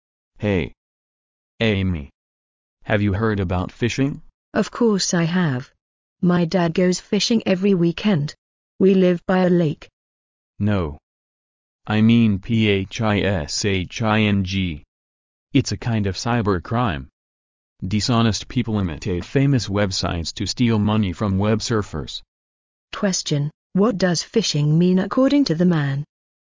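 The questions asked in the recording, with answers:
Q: what does phishing mean according to the man?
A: A cybercrime where dishonest people imitate famous websites to steal money from web surfers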